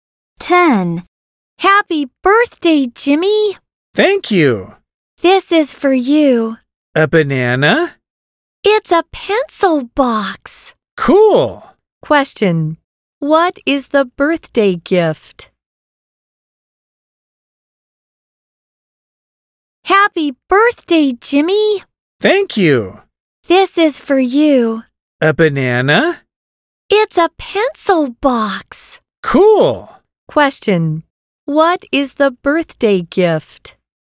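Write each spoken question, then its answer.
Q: Question. What is the birthday gift?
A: A pencil box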